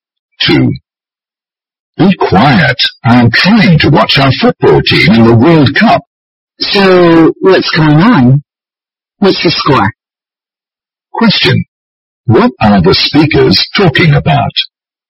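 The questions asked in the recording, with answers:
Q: What are the speakers talking about?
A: A World Cup football match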